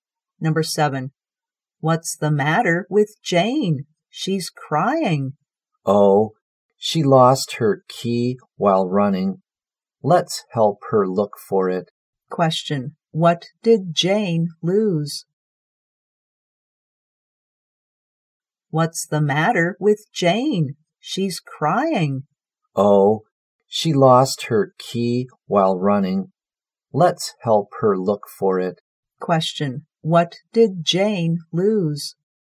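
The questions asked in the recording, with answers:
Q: what did Jane lose?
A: Her key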